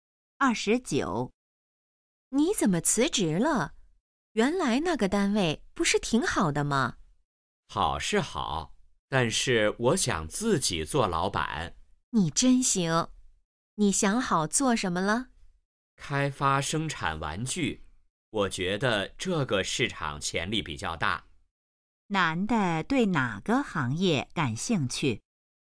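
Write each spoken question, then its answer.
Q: 男的对哪个行业感兴趣?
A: 玩具行业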